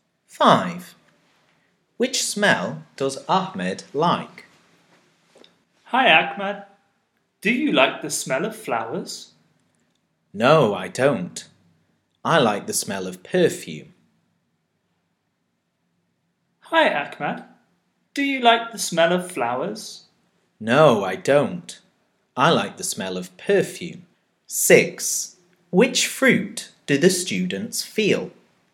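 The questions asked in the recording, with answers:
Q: Which smell does Ahmed like?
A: perfume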